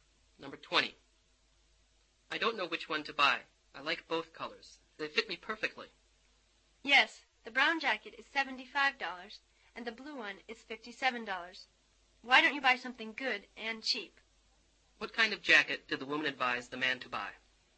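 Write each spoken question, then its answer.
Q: What kind of jacket did the woman advise the man to buy?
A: The blue one, at $57.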